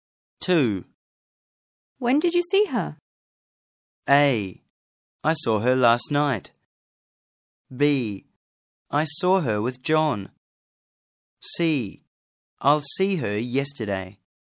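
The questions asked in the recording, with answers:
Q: When did you see her?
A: A: I saw her last night.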